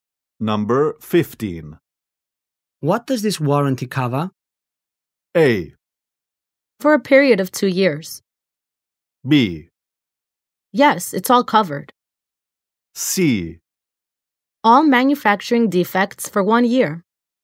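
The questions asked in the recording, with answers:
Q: What does this warranty cover?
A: C: All manufacturing defects for 1 year.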